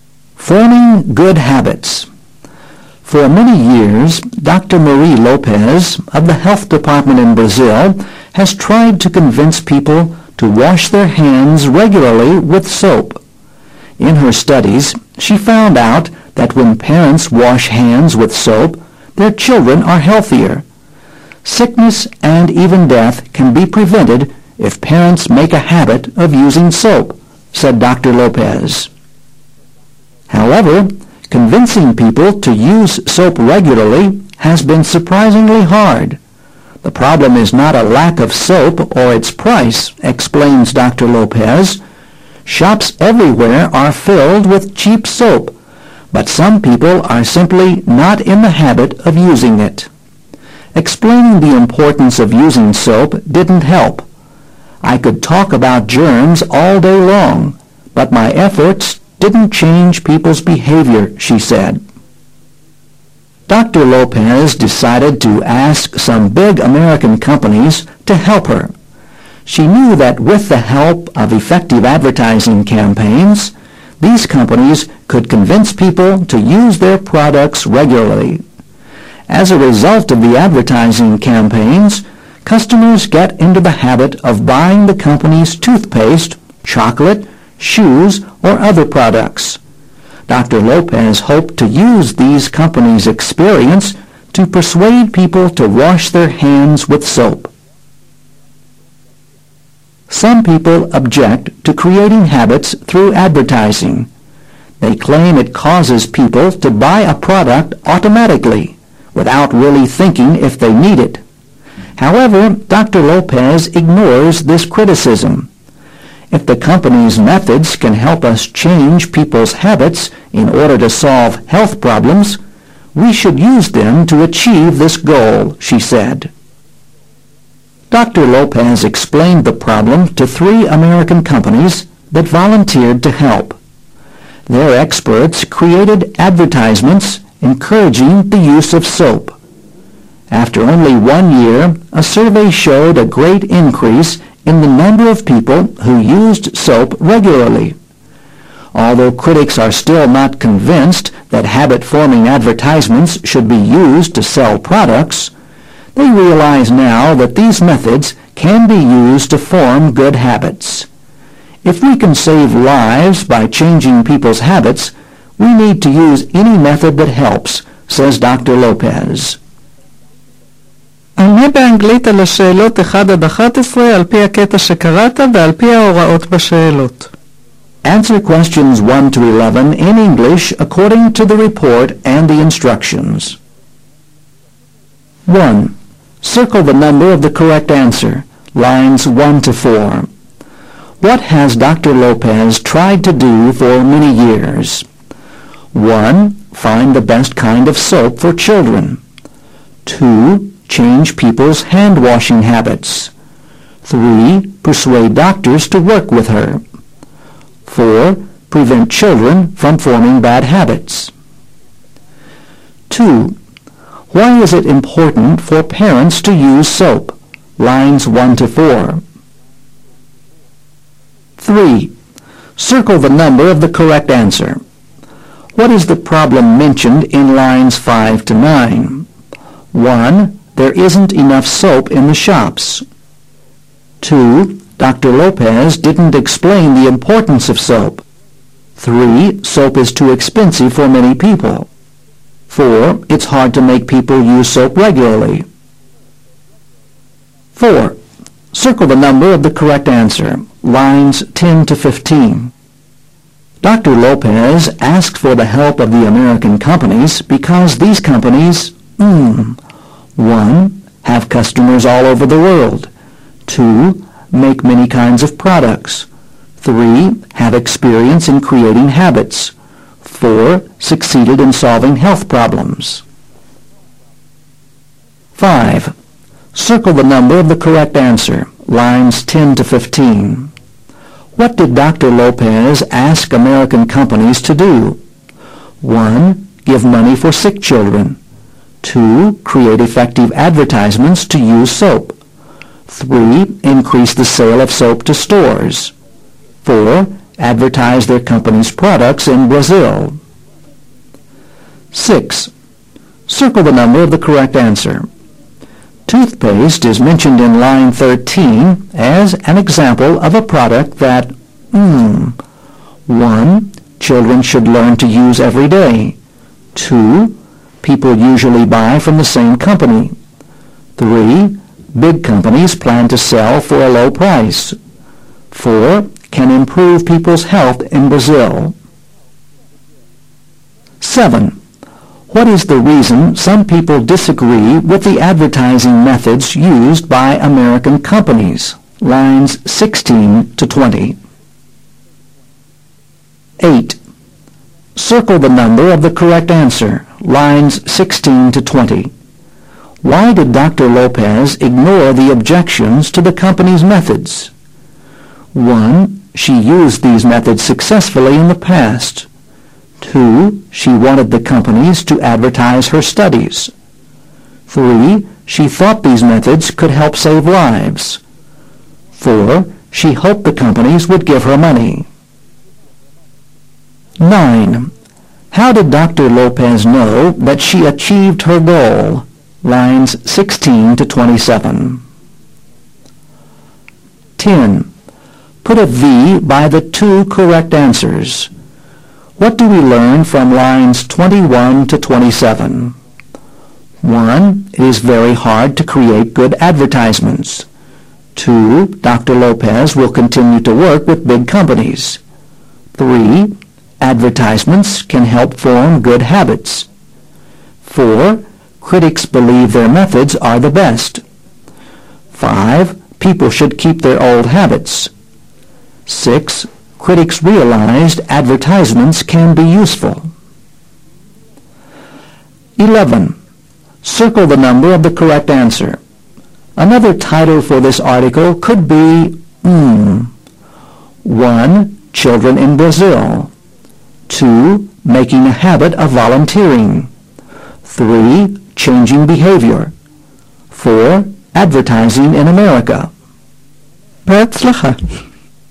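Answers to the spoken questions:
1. 2: Change people's hand washing habits.
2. Their children are healthier; sickness and even death can be prevented.
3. 4: It's hard to make people use soap regularly.
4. 3: have experience in creating habits
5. 2: Create effective advertisements to use soap.
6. 2: People usually buy from the same company.
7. It causes people to buy a product automatically, without thinking if they need it.
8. 3: She thought these methods could help save lives.
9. A survey showed a great increase in the number of people who used soap regularly.
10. 3: Advertisements can help form good habits; 6: Critics realized advertisements can be useful.
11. 3: Changing behavior.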